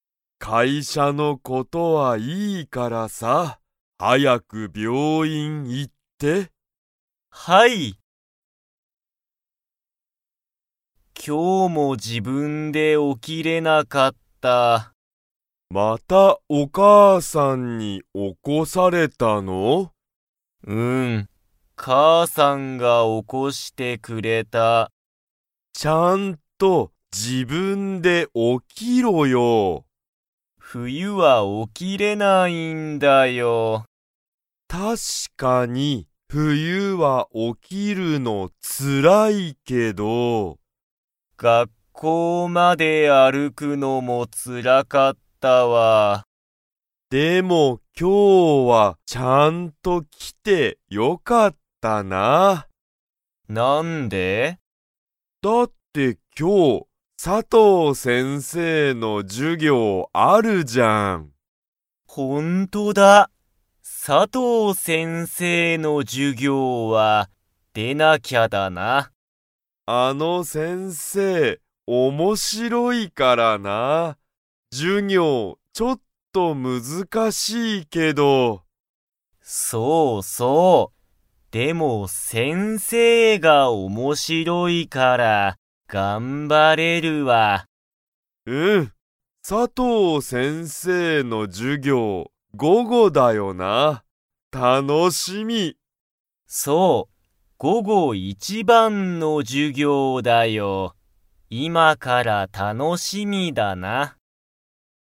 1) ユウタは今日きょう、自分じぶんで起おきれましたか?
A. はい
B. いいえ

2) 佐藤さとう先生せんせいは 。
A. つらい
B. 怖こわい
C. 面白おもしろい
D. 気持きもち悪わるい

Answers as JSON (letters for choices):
{"1": "B", "2": "C"}

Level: Level 3